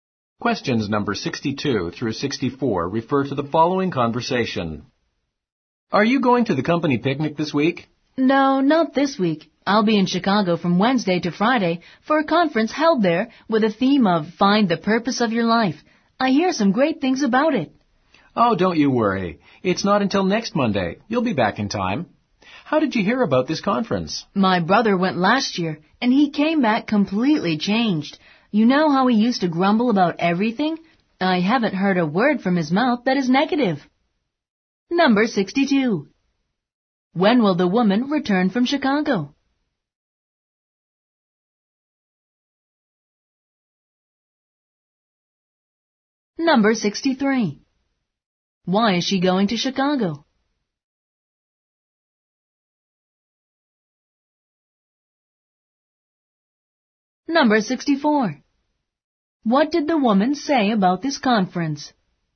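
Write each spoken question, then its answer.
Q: Why is she going to Chicago?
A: For a conference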